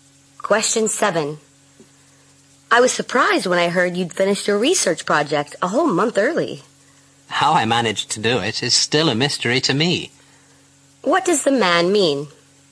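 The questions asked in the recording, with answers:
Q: What does the man mean?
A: He doesn't know how he finished so early.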